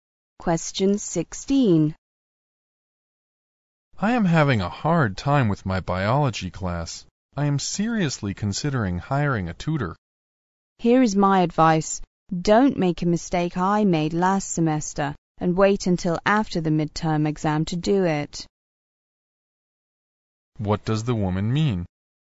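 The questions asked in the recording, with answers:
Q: What does the woman mean?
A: The man should hire a tutor before the midterm exam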